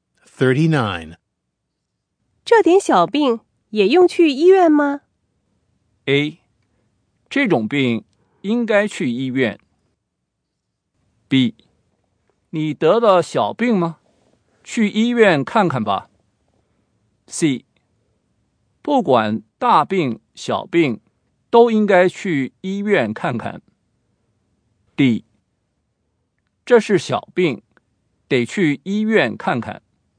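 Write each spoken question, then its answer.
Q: 这点小病也用去医院吗?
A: C: 不管大病小病都应该去医院看看。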